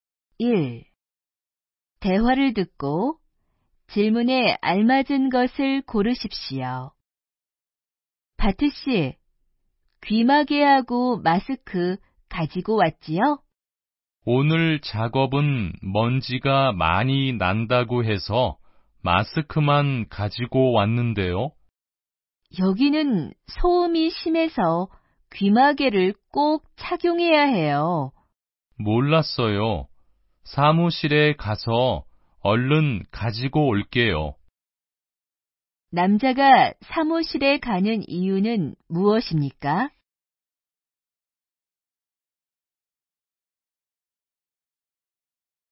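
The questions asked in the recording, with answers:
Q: 남자가 사무실에 가는 이유는 무엇입니까?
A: 귀마개를 가지러 가려고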